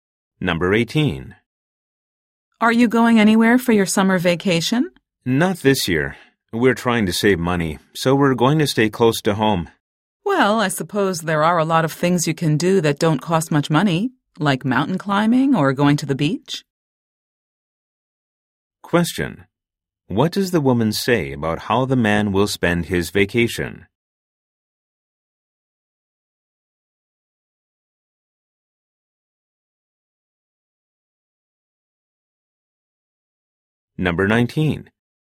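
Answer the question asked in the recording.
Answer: He can do inexpensive things like mountain climbing or going to the beach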